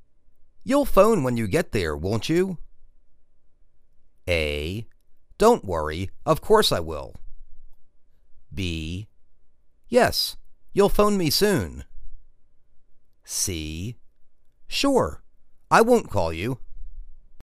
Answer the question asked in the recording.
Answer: Don't worry. Of course I will.